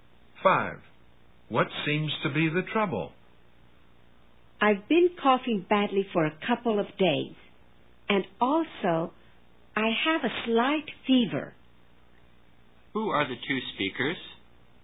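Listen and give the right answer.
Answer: A doctor and a patient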